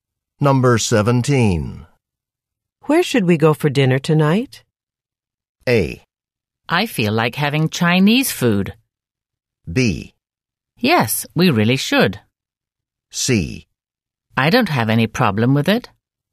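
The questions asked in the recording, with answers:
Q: Where should we go for dinner tonight?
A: A: I feel like having Chinese food.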